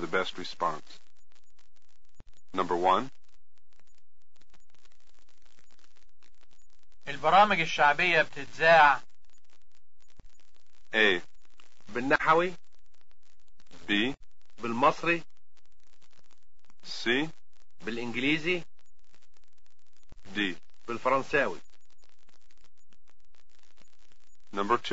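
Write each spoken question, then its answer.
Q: البرامج الشعبية بتتزاع.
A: B: بالمصري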